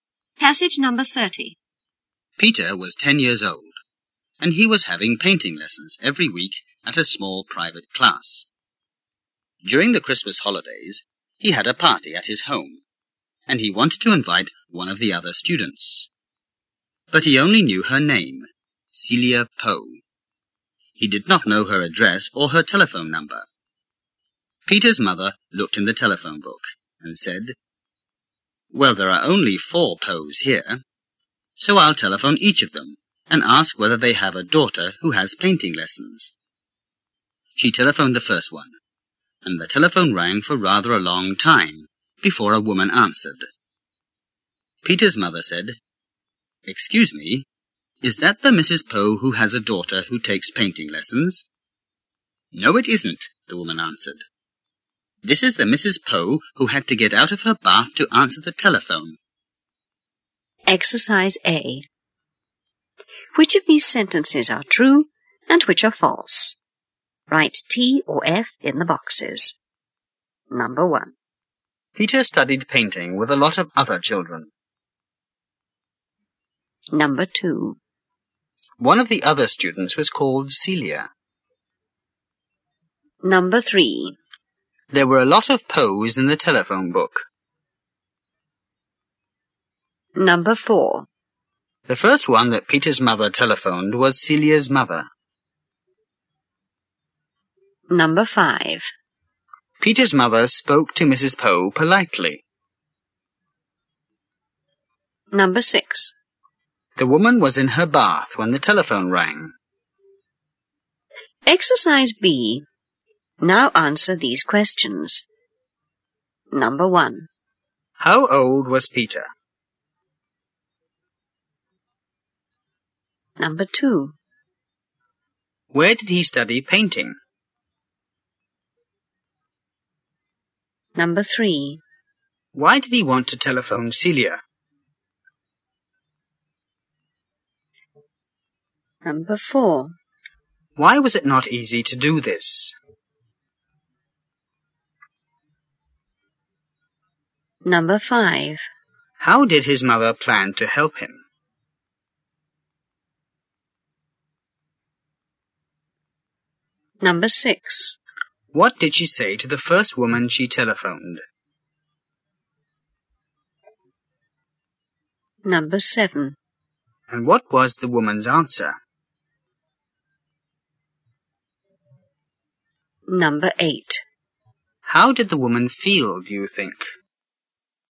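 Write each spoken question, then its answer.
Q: One of the other students was called Celia.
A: True

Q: There were a lot of Poes in the telephone book.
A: False

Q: The first one that Peter's mother telephoned was Celia's mother.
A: False

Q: Peter's mother spoke to Mrs. Poe politely.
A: True

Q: The woman was in her bath when the telephone rang.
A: True

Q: How old was Peter?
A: 10 years old

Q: Where did he study painting?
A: At a small private class

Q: Why did he want to telephone Celia?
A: To invite her to his Christmas party

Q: Why was it not easy to do this?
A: He did not know her address or telephone number

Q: How did his mother plan to help him?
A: By telephoning each of the 4 Poes in the telephone book

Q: What did she say to the first woman she telephoned?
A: Is that the Mrs. Poe who has a daughter who takes painting lessons?

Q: And what was the woman's answer?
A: No, this is the Mrs. 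Poe who had to get out of her bath to answer the telephone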